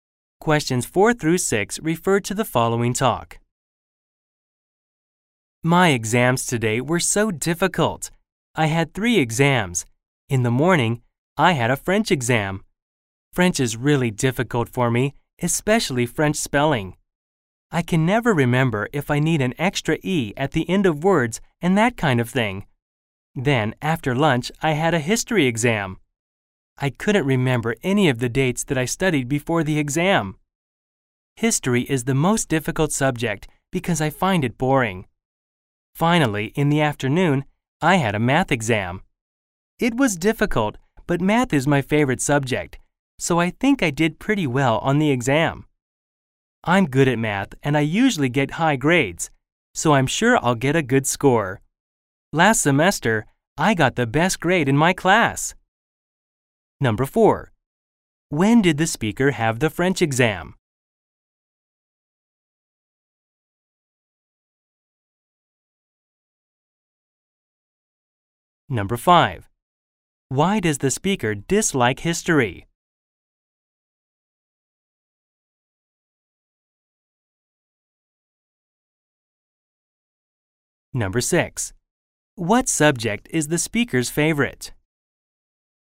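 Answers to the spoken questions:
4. In the morning
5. She finds it boring
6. Math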